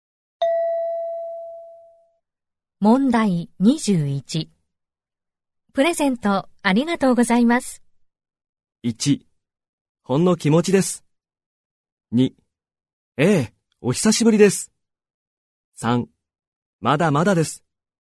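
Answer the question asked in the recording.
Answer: 1: ほんの気持ちです。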